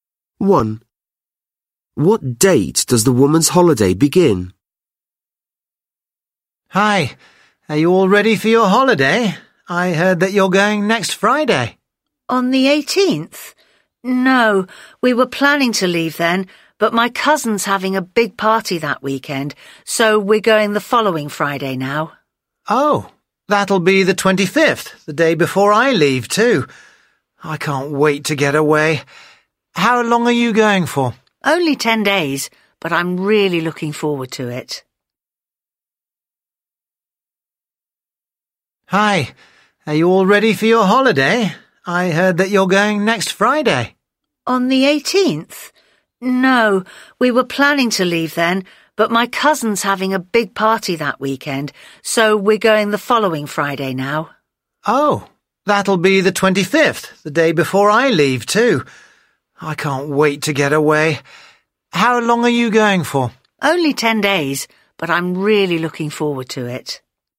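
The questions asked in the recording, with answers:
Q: What date does the woman's holiday begin?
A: The 25th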